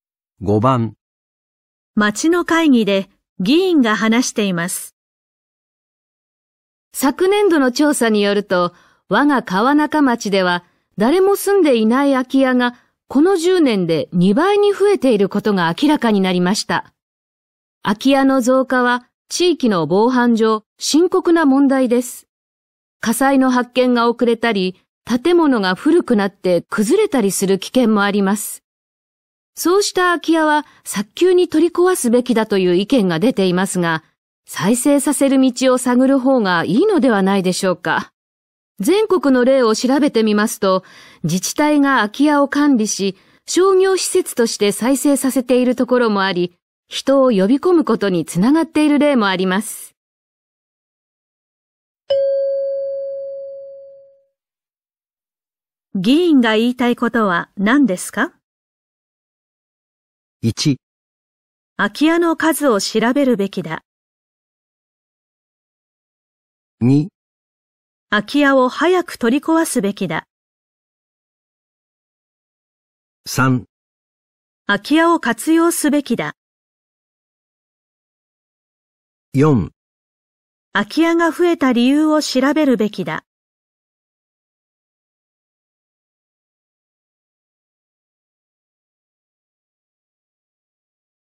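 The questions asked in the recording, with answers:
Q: 議員が言いたいことは何ですか?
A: 3: 空き家を活用すべきだ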